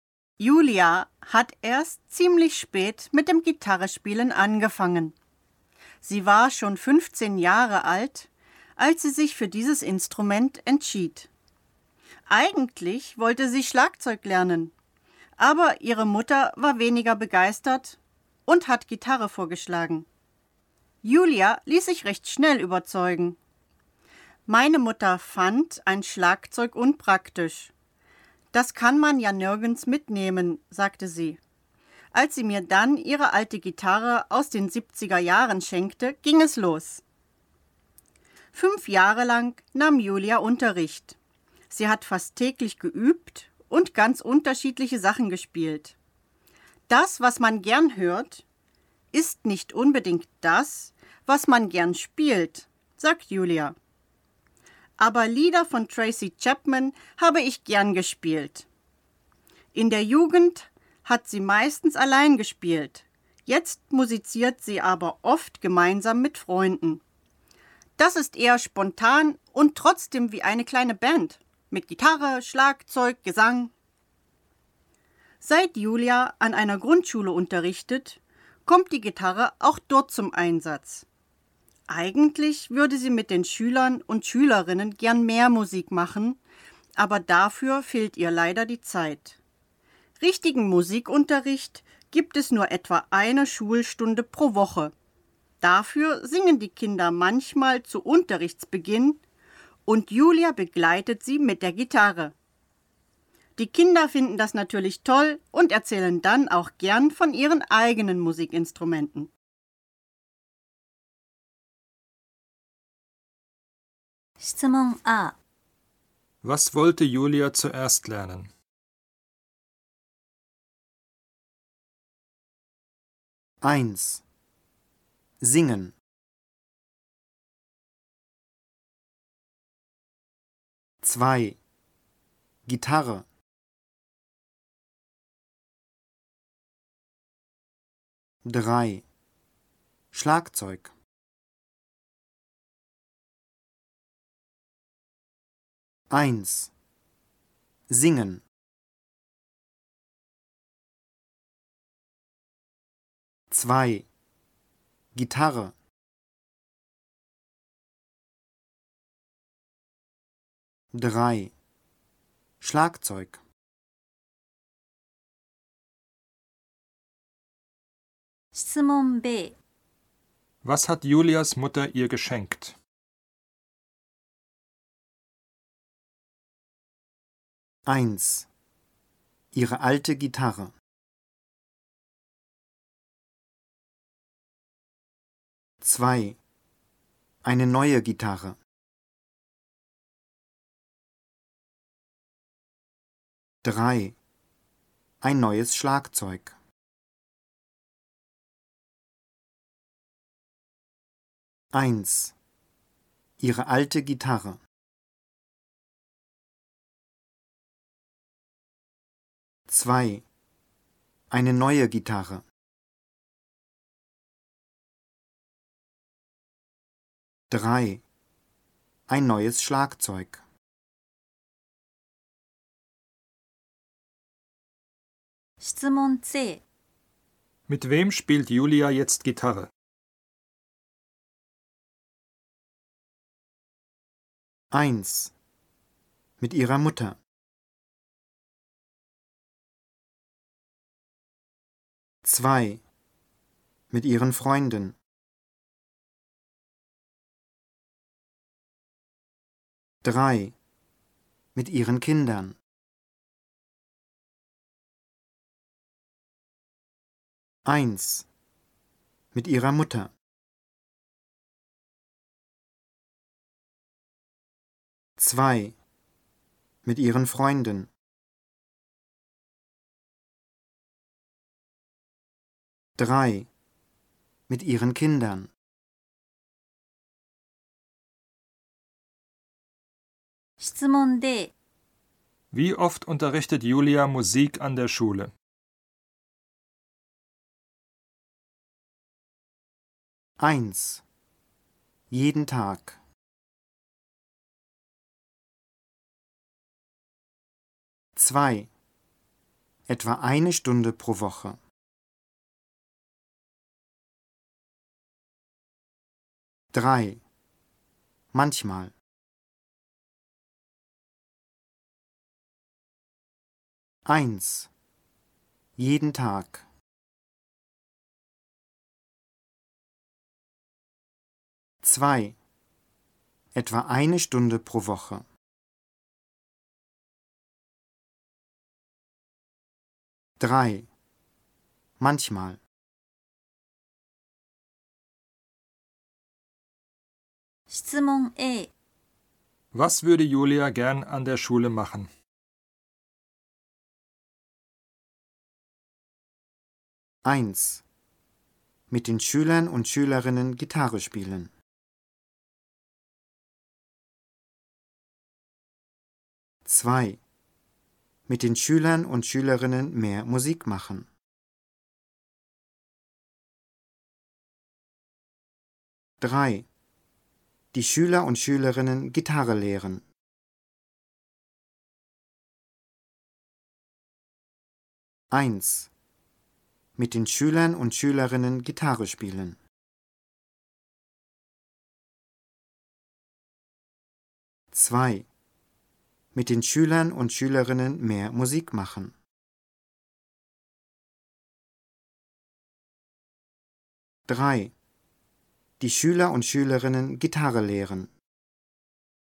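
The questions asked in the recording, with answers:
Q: Was wollte Julia zuerst lernen?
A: 3: Schlagzeug

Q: Was hat Julias Mutter ihr geschenkt?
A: 1: Ihre alte Gitarre

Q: Mit wem spielt Julia jetzt Gitarre?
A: 2: Mit ihren Freunden

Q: Wie oft unterrichtet Julia Musik an der Schule?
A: 2: Etwa eine Stunde pro Woche

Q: Was würde Julia gern an der Schule machen?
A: 2: Mit den Schülern und Schülerinnen mehr Musik machen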